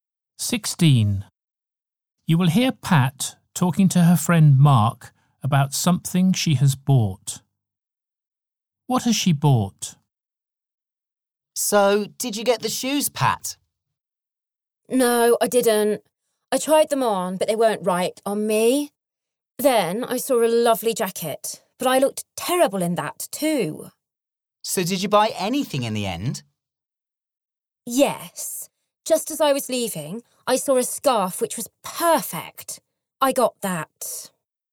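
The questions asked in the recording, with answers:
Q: What has she bought?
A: A scarf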